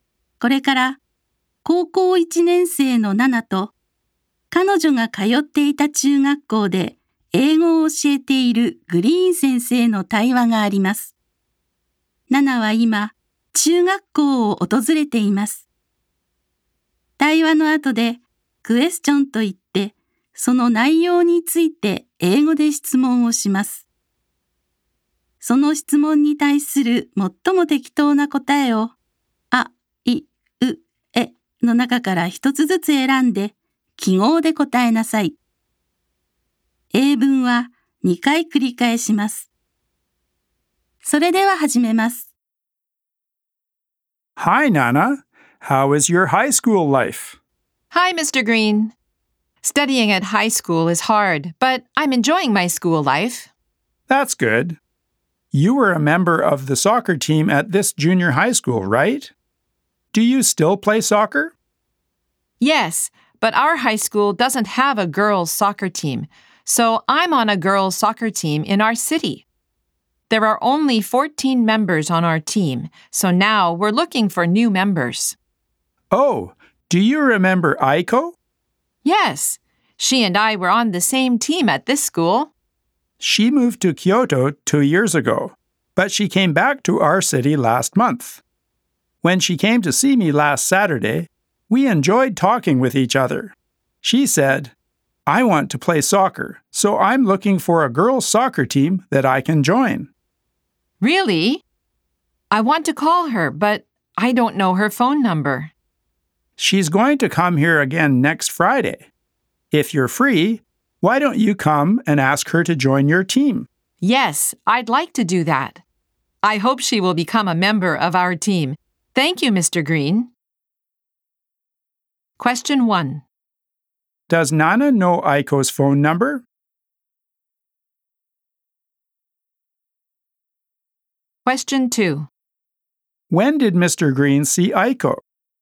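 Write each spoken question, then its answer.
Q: Does Nana know Aiko's phone number?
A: No, she doesn't.

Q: When did Mr. Green see Aiko?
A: Last Saturday.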